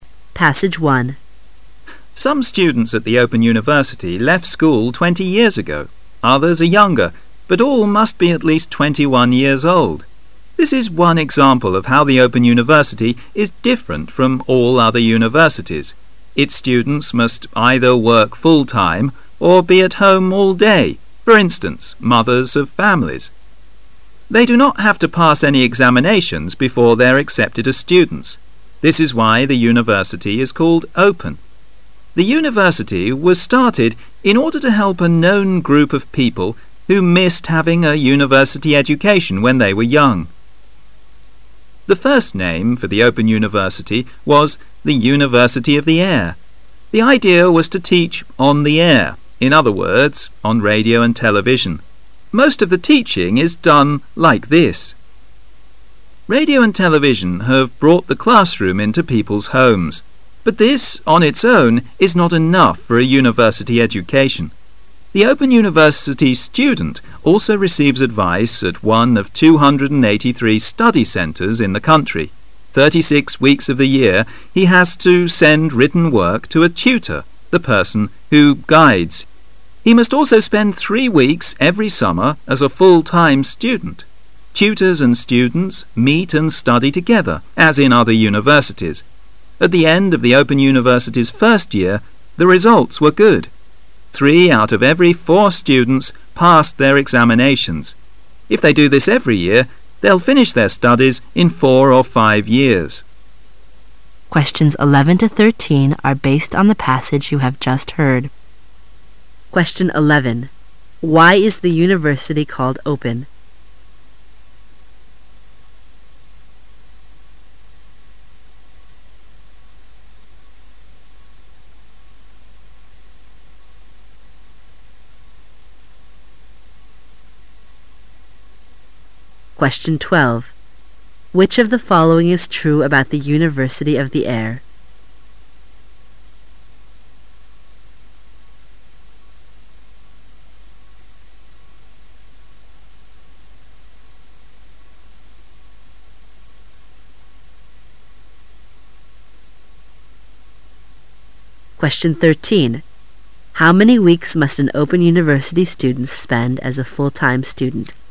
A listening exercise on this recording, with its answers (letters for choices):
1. Which of the following is true about "the University of the Air"?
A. It is the same as an open university.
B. There are no teachers.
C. Students are taught on radio and television.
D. Students and tutors should meet and study together for several weeks.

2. How many weeks must an open university student spend as a full-time student?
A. 36 weeks.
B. 4 weeks.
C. 3 weeks.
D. 5 weeks.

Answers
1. C
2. C

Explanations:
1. 题目问的是:关于"空中大学"下列哪一项是正确的?文章第三段提到:The idea was to teach "on the air",in other words,on radio and television"主意是'在空中'教,换句话说,通过收音机和电视"。由此可知[C]"学生通过收音机和电视受教"是正确选项。
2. 题目问的是:一个开放的大学生必须花多少周做全日学生?文章第三段后半部分提到:He must also spend 3 weeks every summer as a full-time student"他也必须每个暑假花3周时间做全日学生"。由此可知[C]"三周"是正确的。

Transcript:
[解析] 11-13 Some students at the Open University left school 20 years ago.Others are younger but all must be at least 21 years old.This is one example of how the Open University is different from all other universities.Its students must either work full time or be at home all day,for instance,mothers of families. They do not have to pass any examinations before they are accepted as students. This is why the university is called "open". The university was started in order to help a known group of people who missed having a university education when they were young. The first name for the Open University was "the University of the Air". The idea was to teach "on the air", in other words, on radio and television. Most of the teaching is done like this. Radio and television have brought the classroom into people's homes. But this, on its own, is not enough for a university education. The Open University student also receives advice at one of 283 study centres in the country. 36 weeks of the year he has to send written work to a "tutor", the person who guides. He must also spend '3 weeks every summer as a full-time student. Tutors and students meet and study together, as in other universities. At the end of the Open University's first year, the results were good. Three out of every 4 students passed their examinations. If they do this every year, they will finish their studies in 4 or 5 years. Why is the University called "open"?